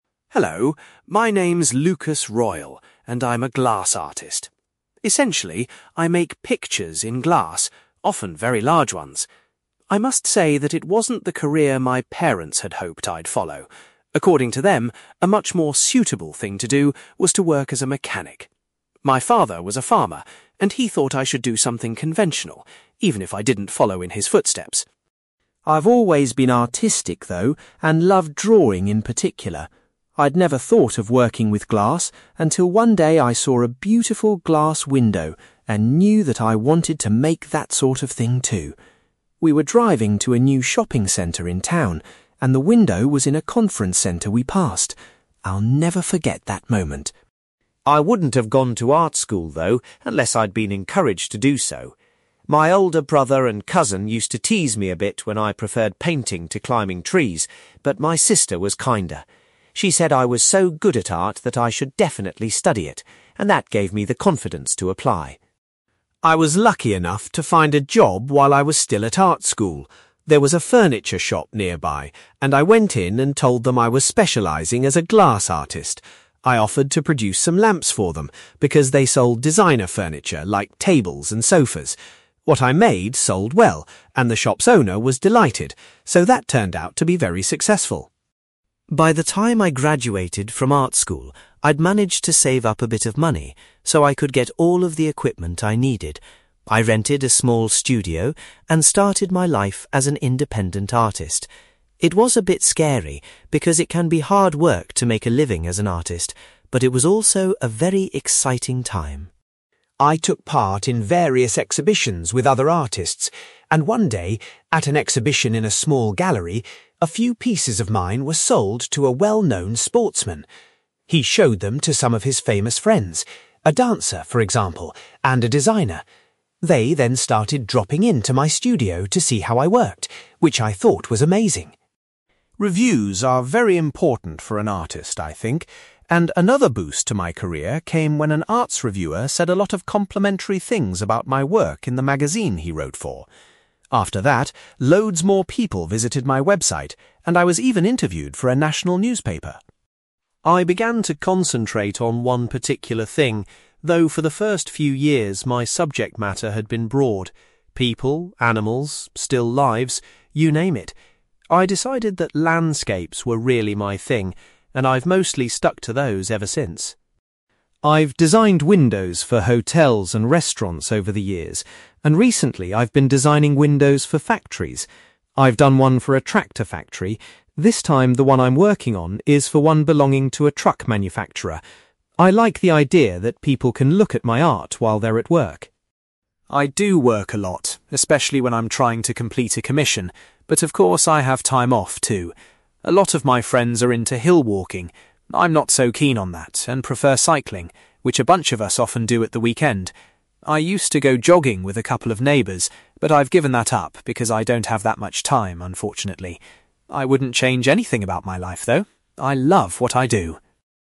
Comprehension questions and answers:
You will hear an artist called Lukas Royle, who makes pictures in glass, talking about his life and work. For questions 9-18, complete the sentences with a word or short phrase.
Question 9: Lukas says his parents wanted him to be a (9)........................... .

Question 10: Lukas was inspired to become a glass artist when he saw a window in a (10)........................... centre.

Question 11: Lukas' (11)........................... encouraged him to go to art school.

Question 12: Lukas got a job making glass (12)........................... while he was still a student.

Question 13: After he graduated, Lukas was able to buy his own (13)........................... .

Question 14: A famous (14)........................... bought some of Lukas' work at an exhibition.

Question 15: A journalist wrote a good review of Lucas' work for an arts (15)........................... .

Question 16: Lukas started to focus on (16)........................... in his work.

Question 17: At the moment Lukas is working on a window for a (17)........................... factory.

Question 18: When Lukas isn't working he likes going (18)........................... with his friends.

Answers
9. mechanic
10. conference
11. sister
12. lamps
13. equipment
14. sportsman
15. magazine
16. landscapes
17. truck
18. cycling

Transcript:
Lukas Royle: Hello, my name's Lukas Royle, and I'm a glass artist. Essentially, I make pictures in glass, often very large ones. I must say that it wasn't the career my parents had hoped I'd follow. According to them, a much more suitable thing to do was to work as a mechanic. My father was a farmer, and he thought I should do something conventional, even if I didn't follow in his footsteps.
I've always been artistic, though, and loved drawing in particular. I'd never thought of working with glass until one day I saw a beautiful glass window and knew that I wanted to make that sort of thing too. We were driving to a new shopping centre in town, and the window was in a conference centre we passed. I'll never forget that moment.
I wouldn't have gone to art school, though, unless I'd been encouraged to do so. My older brother and cousin used to tease me a bit when I preferred painting to climbing trees, but my sister was kinder. She said I was so good at art that I should definitely study it, and that gave me the confidence to apply.
I was lucky enough to find a job while I was still at art school. There was a furniture shop nearby, and I went in and told them I was specialising as a glass artist. I offered to produce some lamps for them, because they sold designer furniture like tables and sofas. What I made sold well, and the shop's owner was delighted, so that turned out to be very successful.
By the time I graduated from art school, I'd managed to save up a bit of money, so I could get all of the equipment I needed. I rented a small studio and started my life as an independent artist. It was a bit scary, because it can be hard work to make a living as an artist, but it was also a very exciting time!
I took part in various exhibitions with other artists, and one day, at an exhibition in a small gallery, a few pieces of mine were sold to a well-known sportsman. He showed them to some of his famous friends - a dancer, for example, and a designer. They then started dropping in to my studio to see how I worked, which I thought was amazing.
Reviews are very important for an artist, I think, and another boost to my career came when an arts reviewer said a lot of complimentary things about my work in the magazine he wrote for. After that, loads more people visited my website, and I was even interviewed for a national newspaper.
I began to concentrate on one particular thing, though for the first few years my subject matter had been broad: people, animals, still lives - you name it. I decided that landscapes were really my thing, and I've mostly stuck to those ever since.
I've designed windows for hotels and restaurants over the years, and recently I've been designing windows for factories. I've done one for a tractor factory - this time the one I'm working on is for one belonging to a truck manufacturer. I like the idea that people can look at my art while they're at work.
I do work a lot, especially when I'm trying to complete a commission, but of course I have time off too. A lot of my friends are into hill walking. I'm not so keen on that and prefer cycling, which a bunch of us often do at the weekend. I used to go jogging with a couple of neighbours, but I've given that up because I don't have that much time, unfortunately. I wouldn't change anything about my life, though, I love what I do!

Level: B2